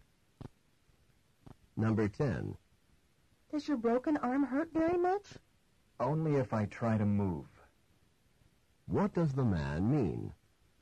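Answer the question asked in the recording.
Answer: His arm hurts only when he moves it.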